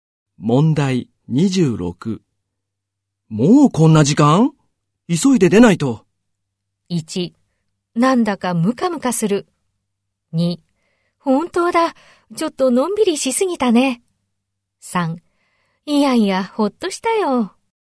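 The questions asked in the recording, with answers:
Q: もうこんな時間?急いで出ないと。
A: 2: 本当だ。ちょっとのんびりしすぎたね。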